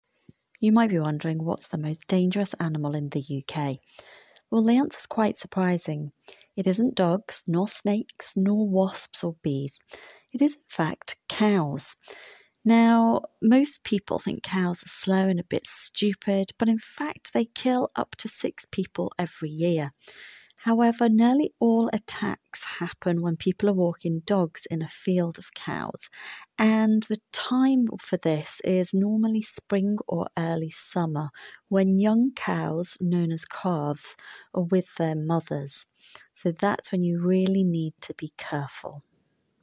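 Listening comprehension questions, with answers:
Listen to the recording TWICE. Tick all the sentences below which are TRUE about the recording.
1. Cows are very intelligent.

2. Cows kill more people than snakes.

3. Baby cows are called calves.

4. Dogs are scared of cows and snakes.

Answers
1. False
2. True
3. True
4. False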